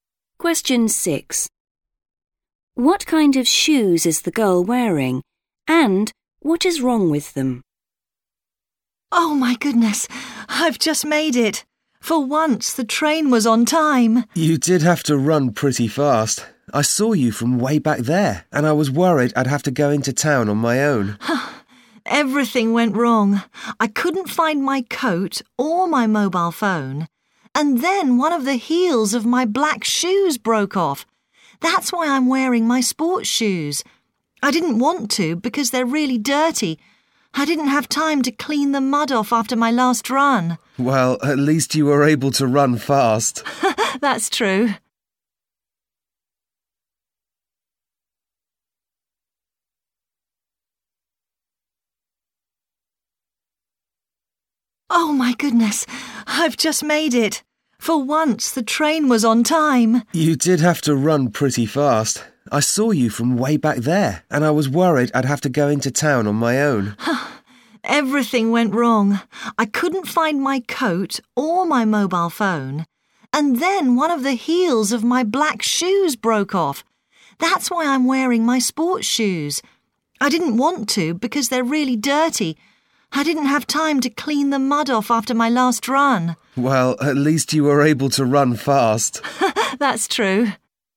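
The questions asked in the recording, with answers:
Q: What kind of shoes is the girl wearing?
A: sports shoes

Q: And what is wrong with them?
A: they are dirty/muddy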